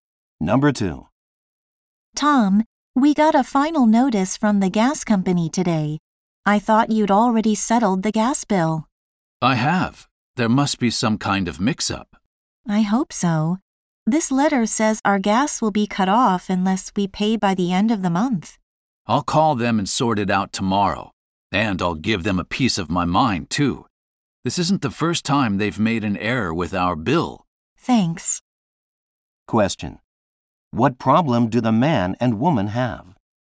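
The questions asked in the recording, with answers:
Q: What problem do the man and woman have?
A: The gas company wrongly says their bill is unpaid and threatens to cut off their gas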